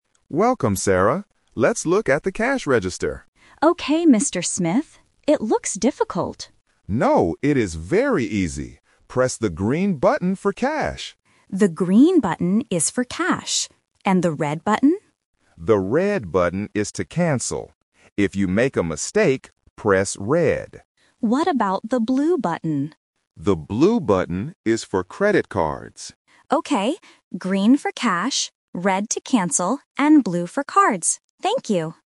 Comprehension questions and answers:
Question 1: What is the green button for?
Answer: For cash

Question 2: Which button do you press if you make a mistake?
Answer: The red button

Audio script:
Manager: Welcome, Sarah. Let's look at the cash register.
Sarah: Okay, Mr. Smith. It looks difficult.
Manager: No, it is very easy. Press the green button for cash.
Sarah: The green button is for cash. And the red button?
Manager: The red button is to cancel. If you make a mistake, press red.
Sarah: What about the blue button?
Manager: The blue button is for credit cards.
Sarah: Okay. Green for cash, red to cancel, and blue for cards. Thank you!

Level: A1